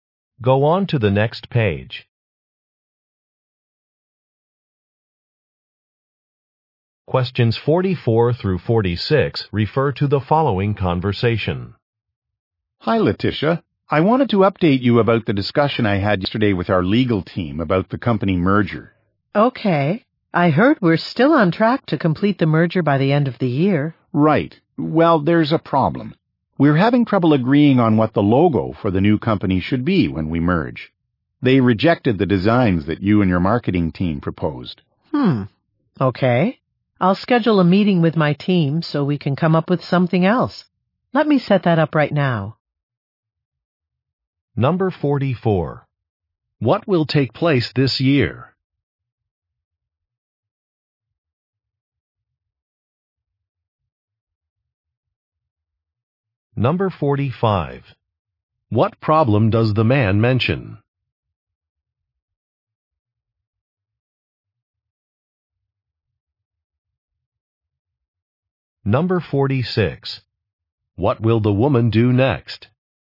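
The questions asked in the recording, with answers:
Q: What will take place this year?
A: A company merger

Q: What problem does the man mention?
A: The proposed logo designs were rejected

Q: What will the woman do next?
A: Schedule a meeting with her team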